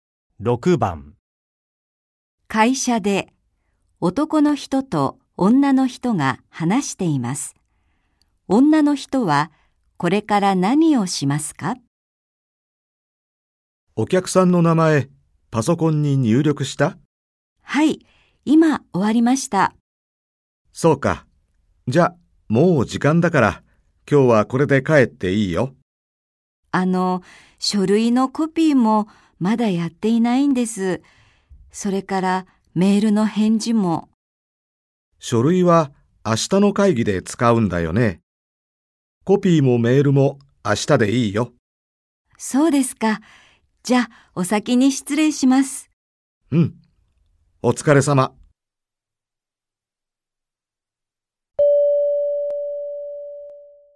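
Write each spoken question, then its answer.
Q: 女の人はこれから何をしますか?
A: 家に帰る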